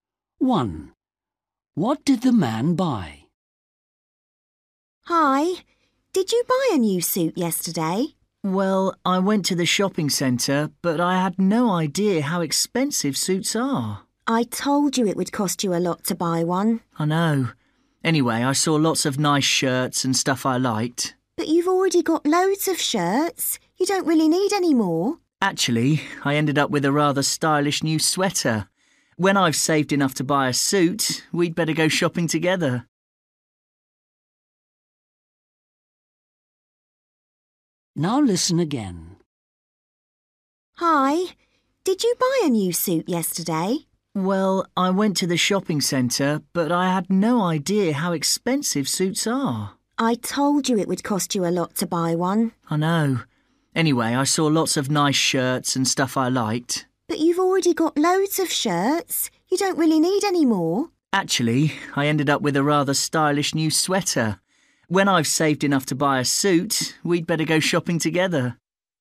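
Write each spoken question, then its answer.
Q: What did the man buy?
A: a sweater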